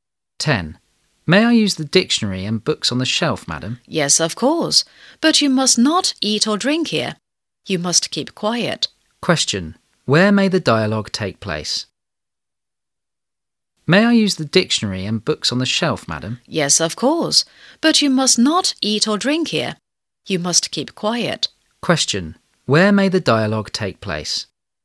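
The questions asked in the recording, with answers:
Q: Question. Where may the dialogue take place?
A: In a library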